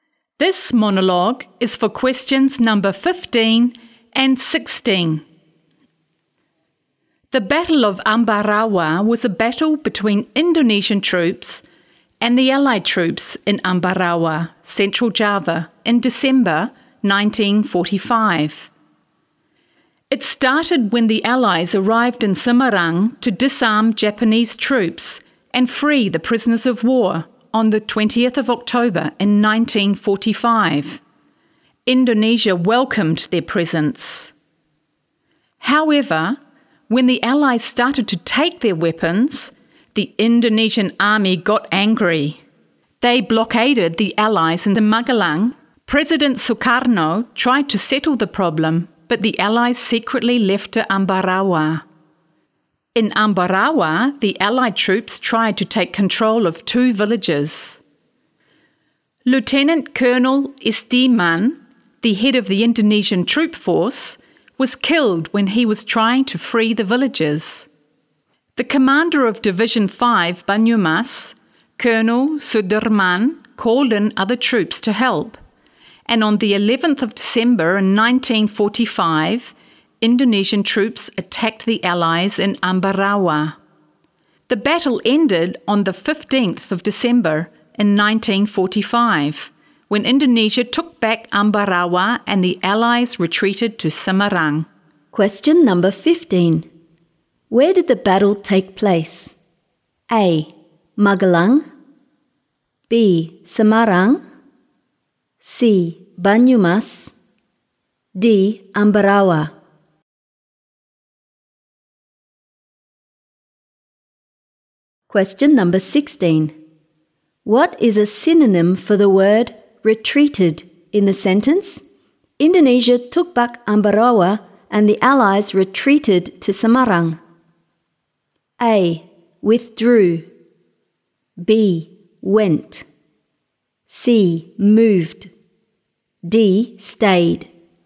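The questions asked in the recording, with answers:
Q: Where did the battle take place?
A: D: Ambarawa.

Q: What is a synonym for the word retreated in the sentence?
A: A: Withdrew.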